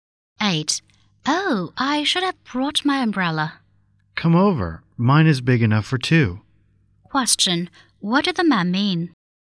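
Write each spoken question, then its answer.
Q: What did the man mean?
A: The woman can share his umbrella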